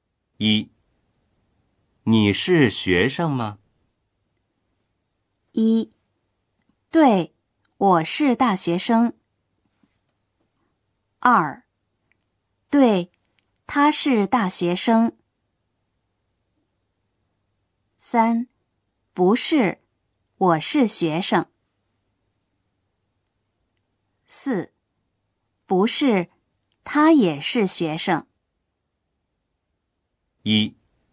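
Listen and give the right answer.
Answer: 1: 对,我是大学生。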